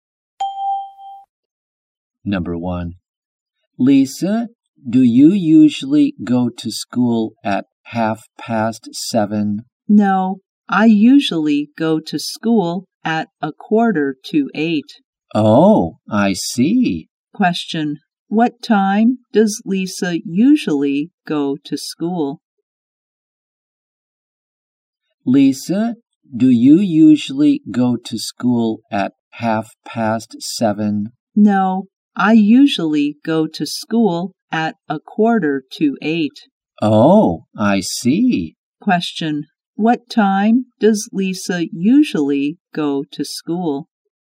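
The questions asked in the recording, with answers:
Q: What time does Lisa usually go to school?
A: At 7:45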